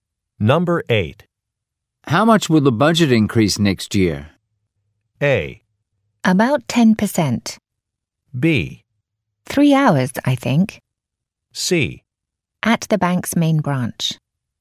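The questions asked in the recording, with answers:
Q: How much will the budget increase next year?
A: A: About 10%.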